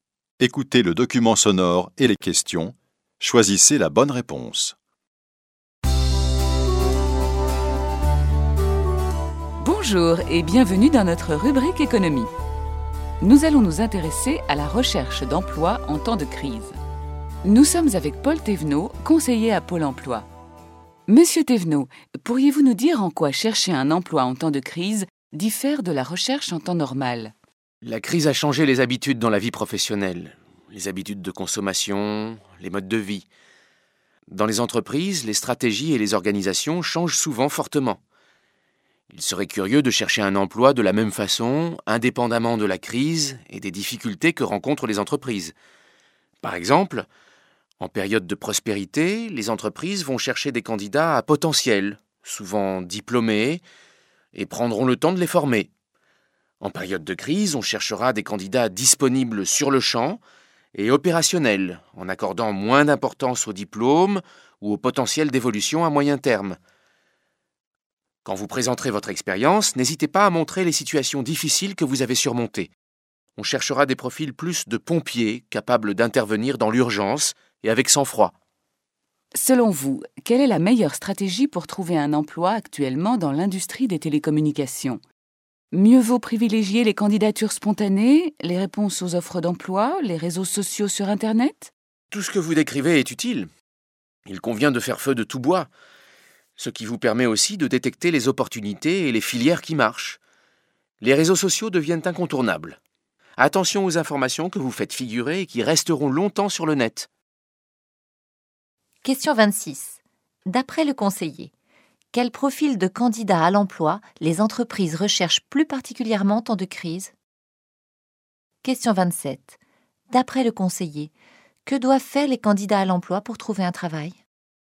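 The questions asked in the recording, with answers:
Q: D'après le conseiller, quel profil de candidat à l'emploi les entreprises recherchent plus particulièrement en temps de crise?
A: Des candidats disponibles tout de suite et opérationnels, capables d'intervenir dans l'urgence avec sang-froid

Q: D'après le conseiller, que doivent faire les candidats à l'emploi pour trouver un travail?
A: Utiliser tous les moyens : candidatures spontanées, réponses aux offres, réseaux sociaux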